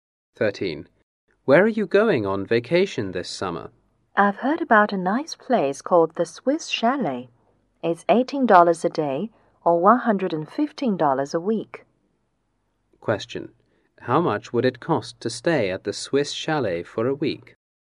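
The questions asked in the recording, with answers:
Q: How much would it cost to stay at the Swiss Chalet for a week?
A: $115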